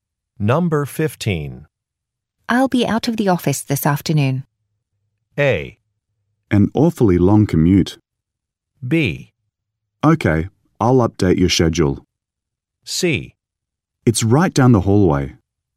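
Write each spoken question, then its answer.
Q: I'll be out of the office this afternoon.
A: B: Okay, I'll update your schedule.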